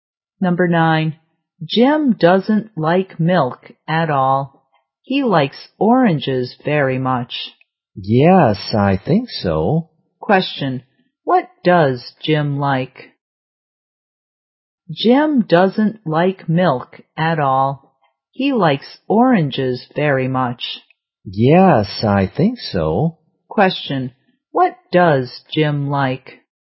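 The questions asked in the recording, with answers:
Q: what does Jim like?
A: Oranges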